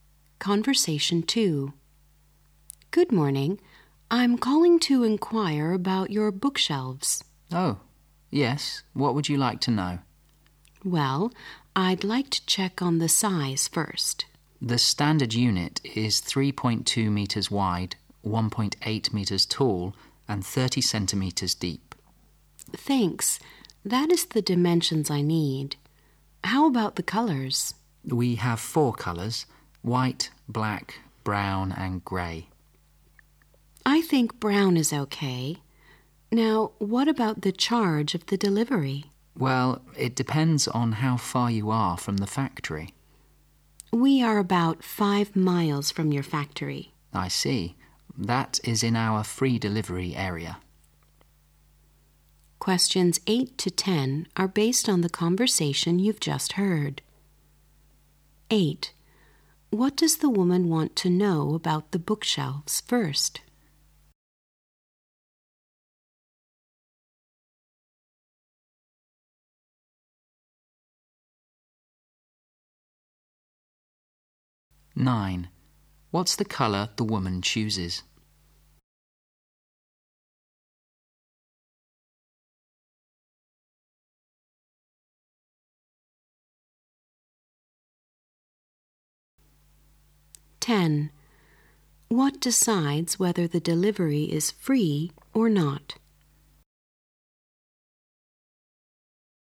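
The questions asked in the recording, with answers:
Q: What does the woman want to know about the bookshelves first?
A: The size

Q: What's the colour the woman chooses?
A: Brown

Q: What decides whether the delivery is free or not?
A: The distance from the factory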